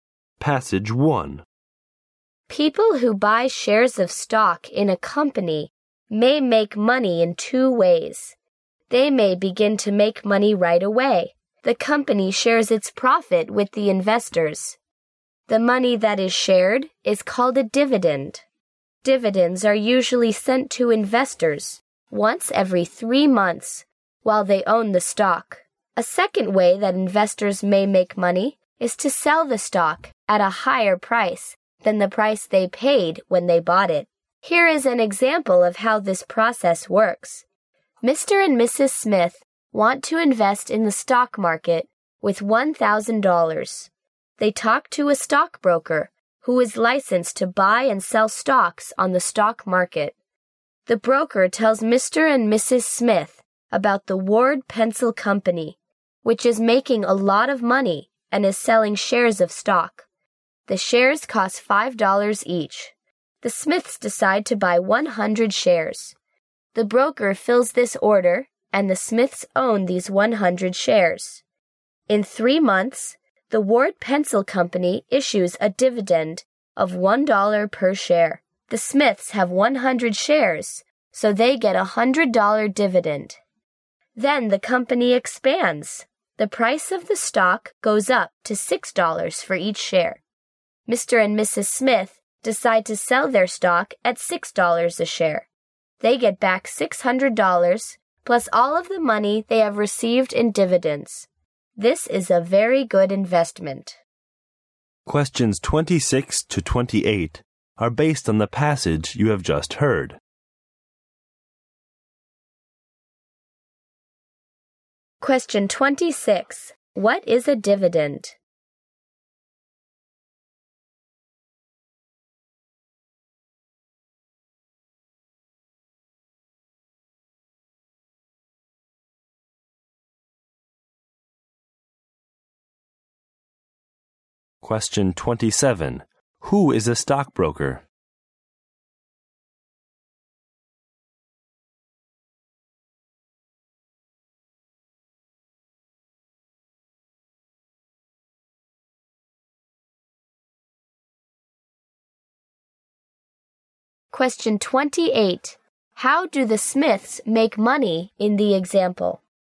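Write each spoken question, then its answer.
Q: What is a dividend?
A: The part of a company's profit that it shares with investors

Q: Who is a stockbroker?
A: A person licensed to buy and sell stocks on the stock market

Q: How do the Smiths make money in the example?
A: They get dividends and also sell the stock for more than they paid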